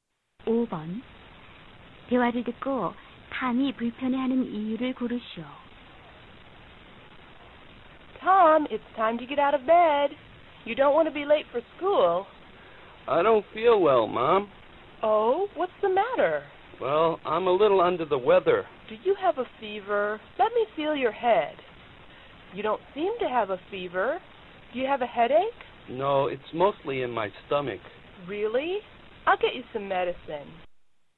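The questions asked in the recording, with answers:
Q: 대화를 듣고 탐이 불편해하는 이유를 고르시오.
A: 배가 아파서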